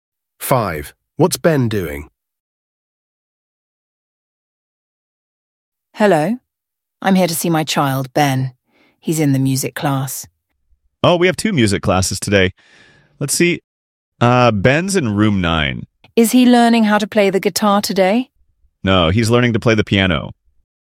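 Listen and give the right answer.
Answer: Learning to play the piano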